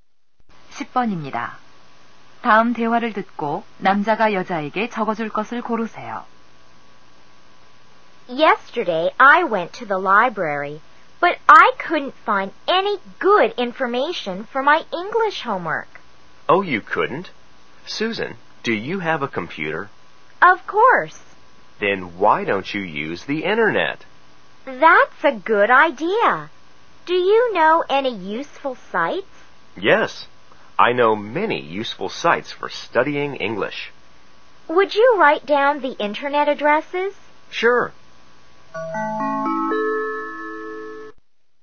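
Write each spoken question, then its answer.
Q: 다음 대화를 듣고 남자가 여자에게 적어줄 것을 고르세요.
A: 영어 공부용 인터넷 사이트 주소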